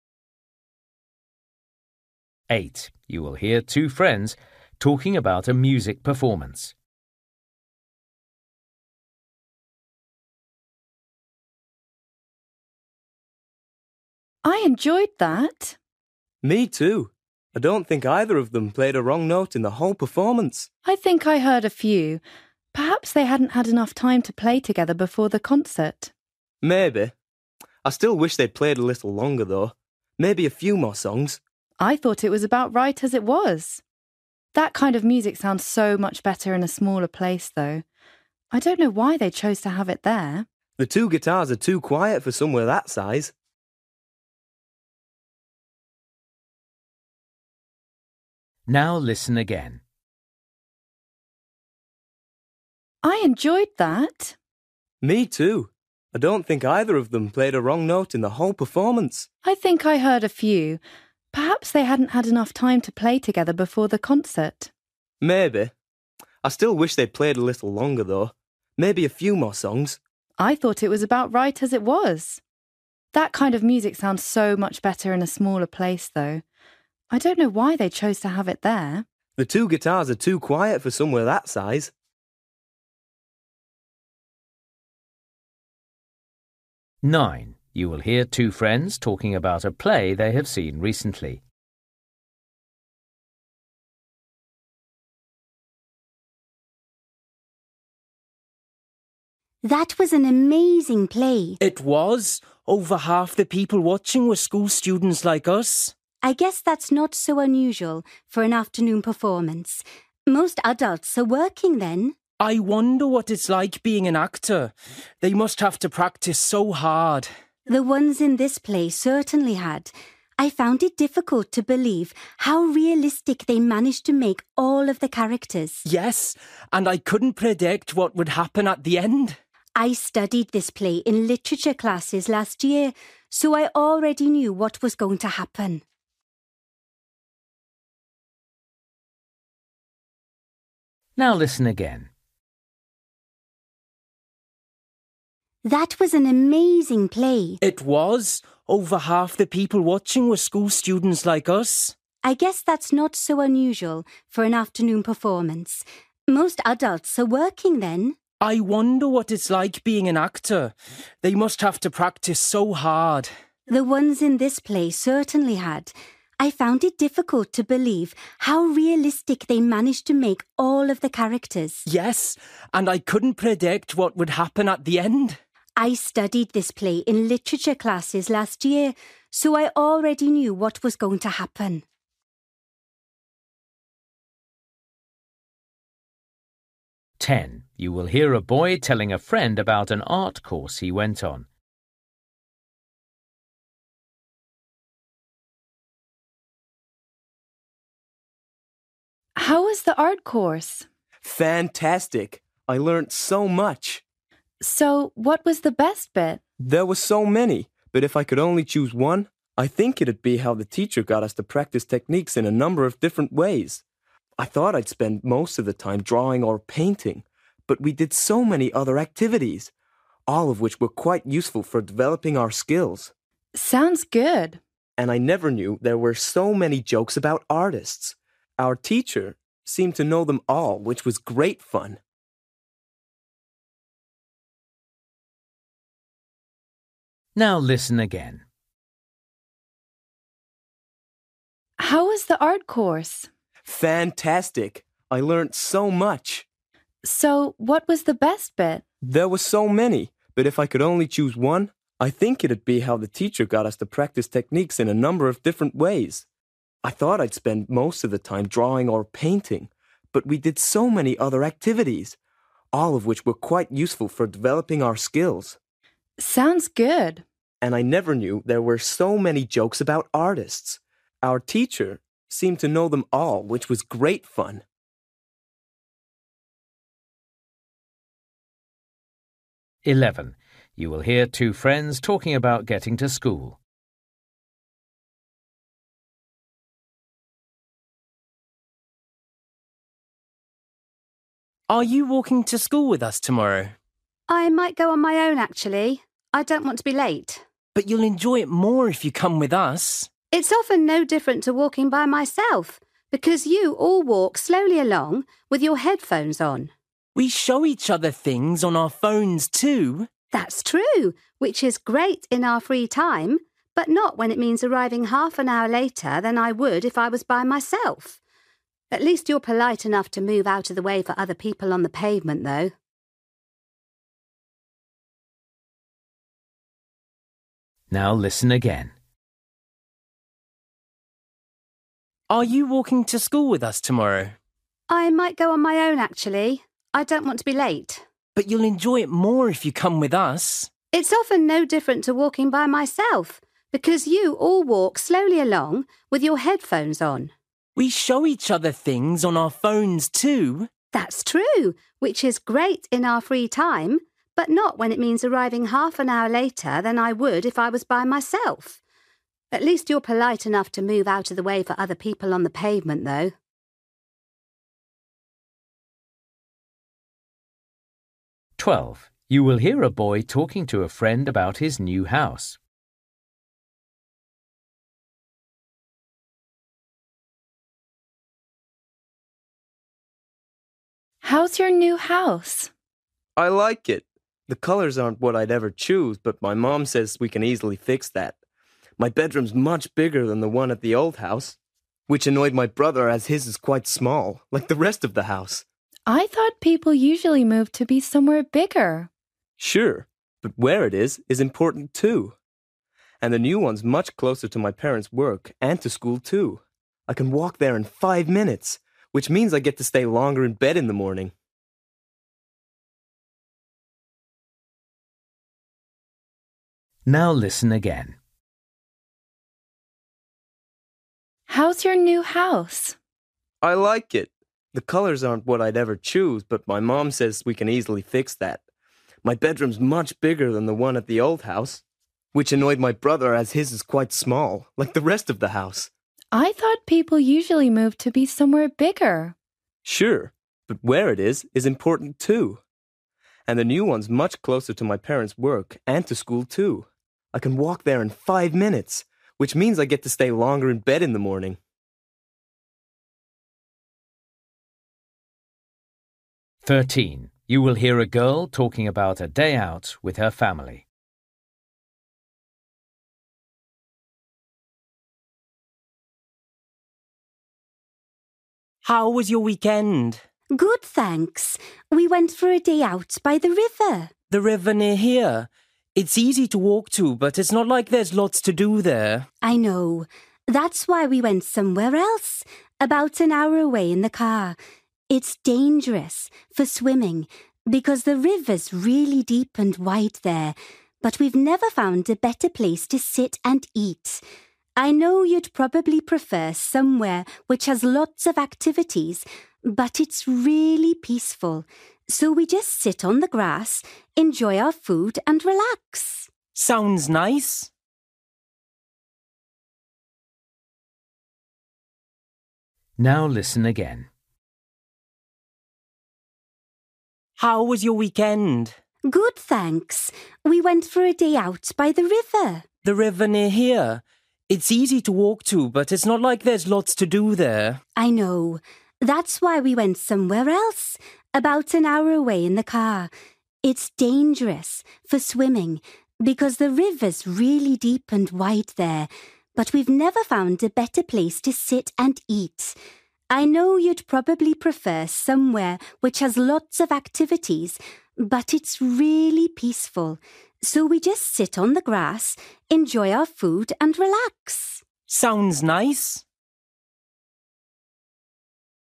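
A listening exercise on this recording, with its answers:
For each question, choose the correct answer.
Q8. You will hear two friends talking about a music performance. The friends agree that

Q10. You will hear a boy telling a friend about an art course he went on. What did the boy enjoy most about it?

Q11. You will hear two friends talking about getting to school. The girl thinks that walking to school with her friends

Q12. You will hear a boy talking to a friend about his new house. How does the boy feel about it?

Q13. You will hear a girl talking about a day out with her family. Why did the girl's family choose to go to the river?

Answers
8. the venue was too big for that kind of music
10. practising techniques in a number of different ways
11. takes too long and makes her late
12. pleased with its location, close to school
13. it is a peaceful place to sit and eat

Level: Luyện nghe trình độ B1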